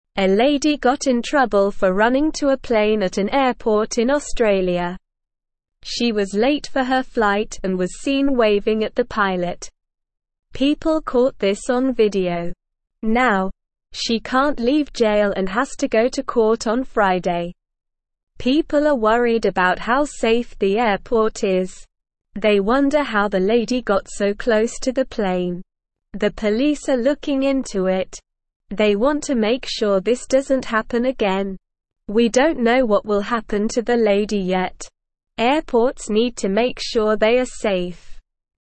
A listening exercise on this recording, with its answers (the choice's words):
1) What did people catch on video?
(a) The lady waving at the pilot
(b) The lady running to the plane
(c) The lady going to jail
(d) The lady going to court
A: The lady waving at the pilot

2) What day does the lady have to go to court?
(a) Monday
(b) Friday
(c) Tuesday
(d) Wednesday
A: Friday

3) What are people worried about?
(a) The lady's flight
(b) The safety of the airport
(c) The lady's jail time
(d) The lady's court appearance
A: The safety of the airport

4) What are the police looking into?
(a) How the lady got to jail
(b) How the lady got to court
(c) How the lady got close to the plane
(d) How the lady got her flight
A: How the lady got close to the plane

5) What do airports need to make sure of?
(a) They are safe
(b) They are fun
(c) They are big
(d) They are small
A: They are safe

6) What do we not know yet about the lady?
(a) Where she is from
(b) How old she is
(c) Why she was late for her flight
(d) What will happen to her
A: What will happen to her

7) Why was the lady late for her flight?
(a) She overslept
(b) She got lost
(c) We don't know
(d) She was playing at the airport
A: We don't know

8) A lady got in trouble for running to a plane at an airport in (1)______.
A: Australia

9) She was (2)______ for her flight and was seen waving at the (3)______.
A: late

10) She was (2)______ for her flight and was seen waving at the (3)______.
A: pilot

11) (4)______ caught this on video.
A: People

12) They wonder how the lady got so (5)______ to the plane.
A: close

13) They (6)______ to (7)______ sure this doesn't happen again.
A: want

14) They (6)______ to (7)______ sure this doesn't happen again.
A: make

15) Airports (8)______ to make sure they are safe.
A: need

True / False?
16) It is not important for airports to ensure safety.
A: False

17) People are worried about how safe the airport is.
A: True

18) She was late for her flight and was waving at the pilot.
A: True

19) The police are investigating the incident to prevent it from happening again.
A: True

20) People did not record a video of the lady running towards the plane.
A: False

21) A lady was in trouble for running towards a plane at an airport in Australia.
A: True

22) They do not want to know how the lady got so close to the plane.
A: False

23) Now, she can leave jail and does not have to go to court on Friday.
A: False

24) Why did the lady get in trouble at the airport?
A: Because she did something wrong.

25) What was the lady doing when she got in trouble?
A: She was running towards the plane and waving at the pilot.

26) What are the police doing to find out how the lady got close to the plane?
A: They are investigating and looking into it.

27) Do we know what will happen to the lady yet?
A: No, we don't know yet.

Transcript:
A lady got in trouble for running to a plane at an airport in Australia. She was late for her flight and was seen waving at the pilot. People caught this on video. Now, she can't leave jail and has to go to court on Friday.
They wonder how the lady got so close to the plane. The police are looking into it. They want to make sure this doesn't happen again. We don't know what will happen to the lady yet. Airports need to make sure they are safe.

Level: Level 1